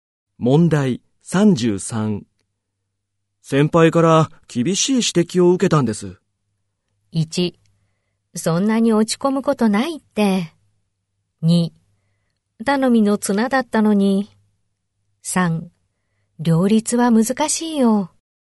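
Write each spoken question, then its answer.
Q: 先輩から厳しい指摘を受けたんです。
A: 1: そんなに落ち込むことないって。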